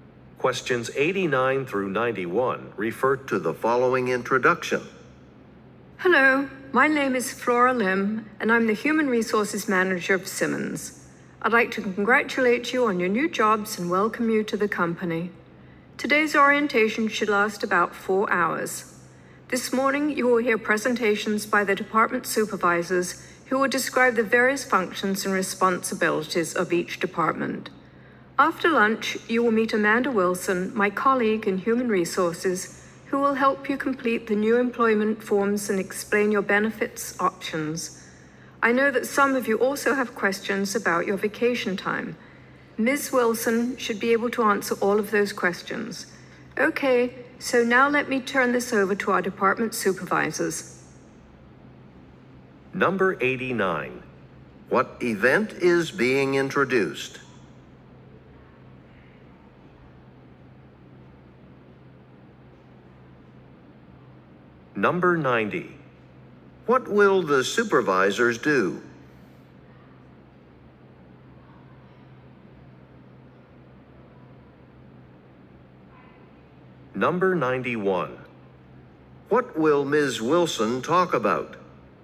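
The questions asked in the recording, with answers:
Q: What event is being introduced?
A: A new employee orientation

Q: What will the supervisors do?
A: Describe the functions and responsibilities of their departments

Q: What will Ms. Wilson talk about?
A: Employment forms and benefits options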